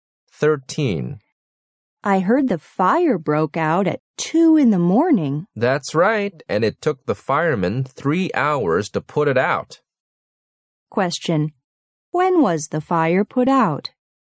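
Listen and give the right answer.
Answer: At 5 in the morning.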